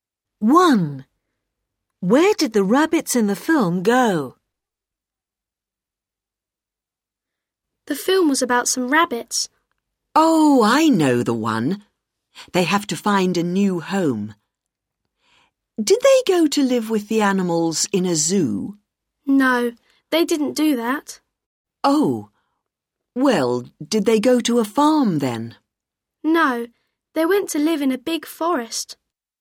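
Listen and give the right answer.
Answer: to a big forest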